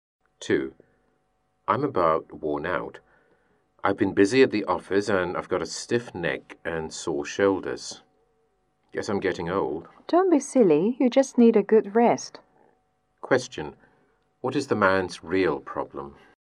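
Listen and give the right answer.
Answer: He is overworked and needs a good rest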